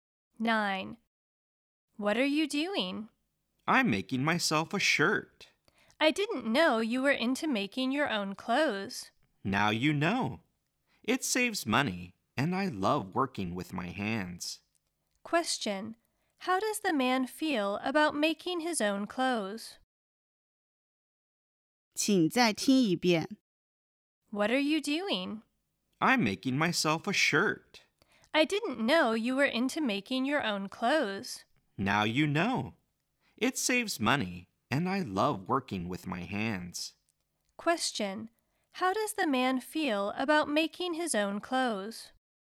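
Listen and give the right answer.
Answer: He enjoys it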